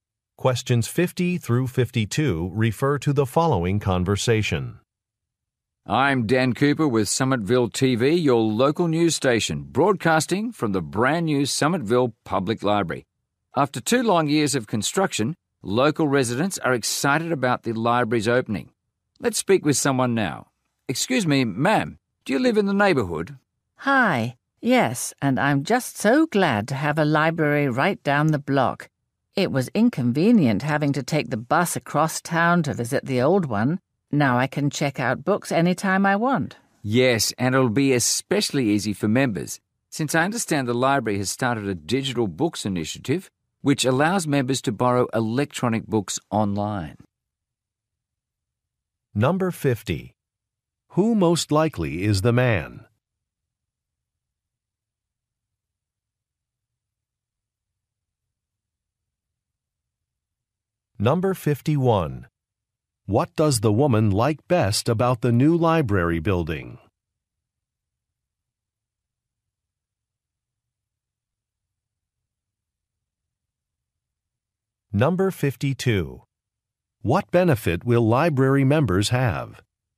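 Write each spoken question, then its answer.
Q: Who most likely is the man?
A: A news reporter

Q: What does the woman like best about the new library building?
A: It is close to her home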